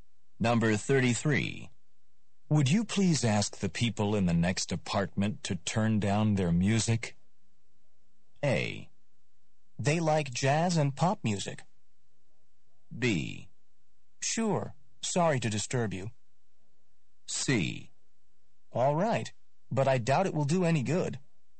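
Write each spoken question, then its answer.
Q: Would you please ask the people in the next apartment to turn down their music?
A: C: All right, but I doubt it will do any good.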